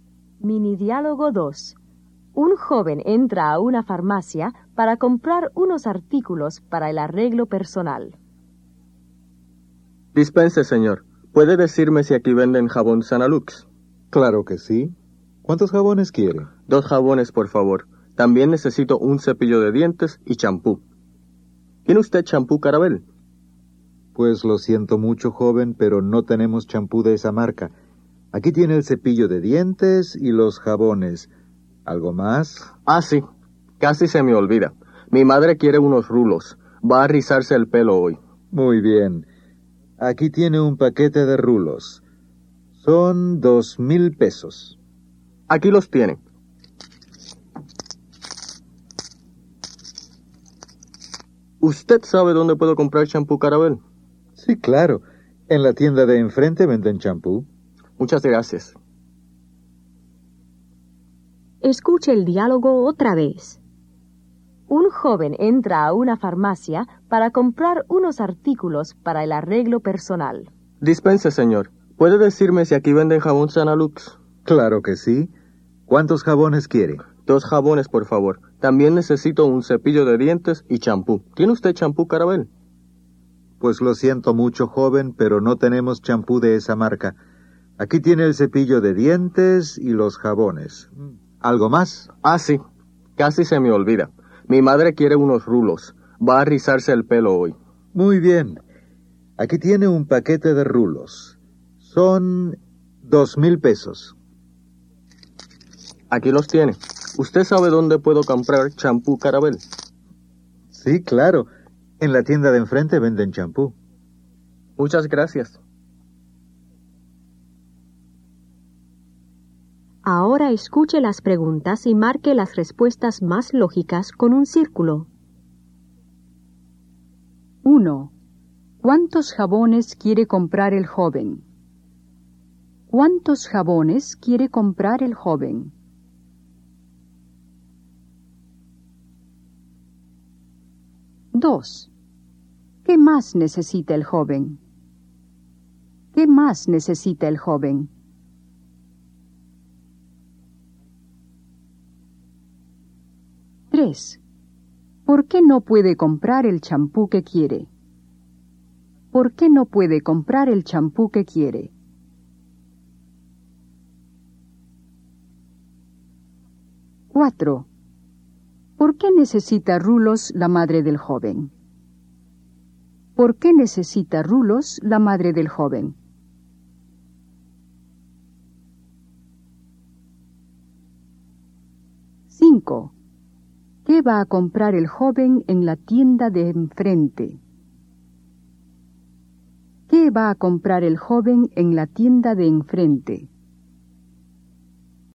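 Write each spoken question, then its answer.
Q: ¿Cuántos jabones quiere comprar el joven?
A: Dos jabones.

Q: ¿Qué más necesita el joven?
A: Un cepillo de dientes y champú.

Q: ¿Por qué no puede comprar el champú que quiere?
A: Porque en la farmacia no tienen champú de esa marca.

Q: ¿Por qué necesita rulos la madre del joven?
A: Porque va a rizarse el pelo hoy.

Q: ¿Qué va a comprar el joven en la tienda de enfrente?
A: Champú Carabel.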